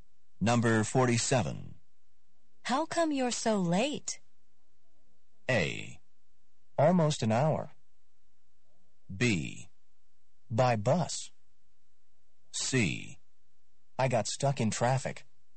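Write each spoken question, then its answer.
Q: How come you're so late?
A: C: I got stuck in traffic.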